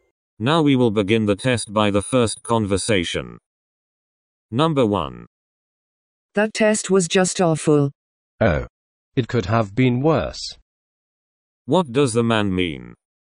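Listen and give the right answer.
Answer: The test was not as bad as it could have been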